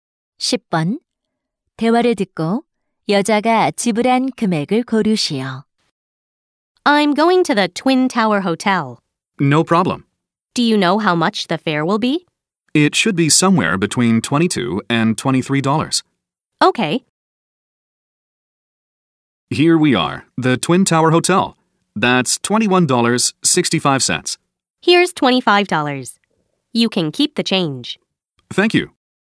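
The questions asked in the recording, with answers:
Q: 대화를 듣고 여자가 지불한 금액을 고르시오.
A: 25달러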